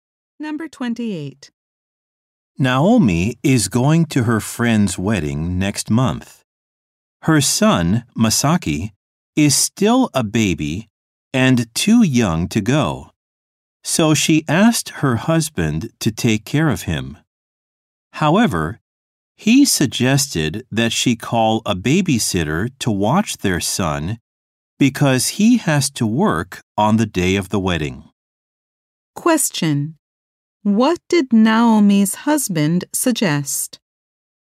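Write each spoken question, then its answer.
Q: Question. What did Naomi's husband suggest?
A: Calling a babysitter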